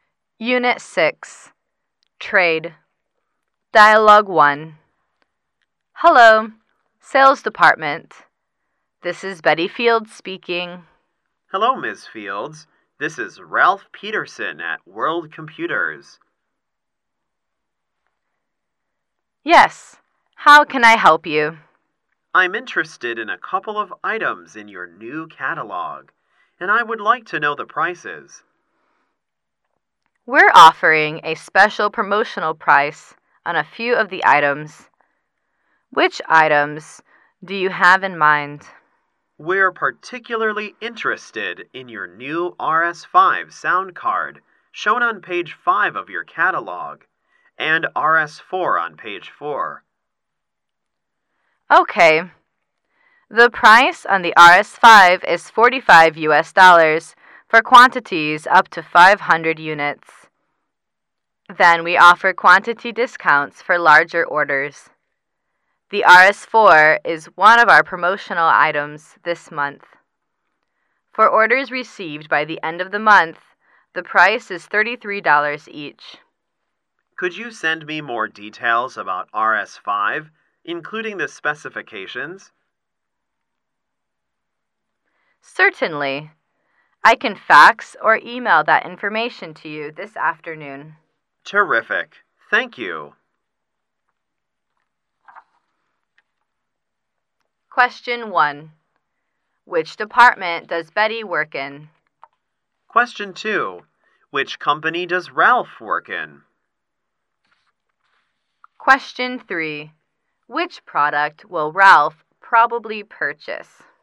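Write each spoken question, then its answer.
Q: Which department does Betty work in?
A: The Sales Department

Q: Which company does Ralph work in?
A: World Computers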